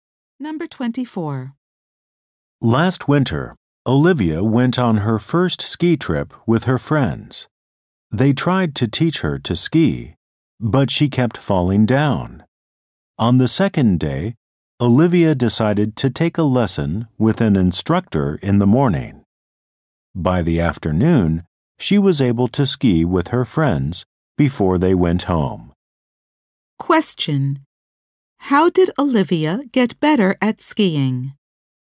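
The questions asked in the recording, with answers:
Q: How did Olivia get better at skiing?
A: She took a lesson with an instructor.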